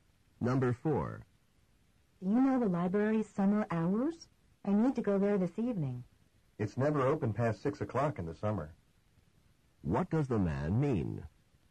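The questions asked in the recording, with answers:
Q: What does the man mean?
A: The library closes by 6 in the summer, so it won't be open this evening.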